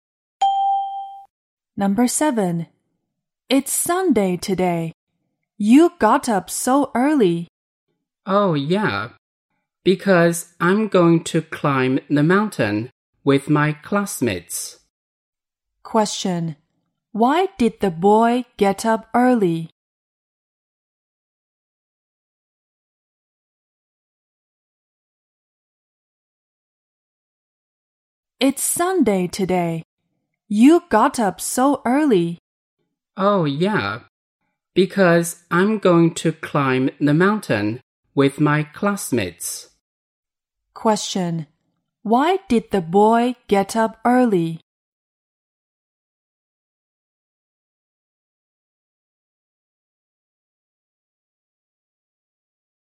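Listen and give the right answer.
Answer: To climb the mountain with his classmates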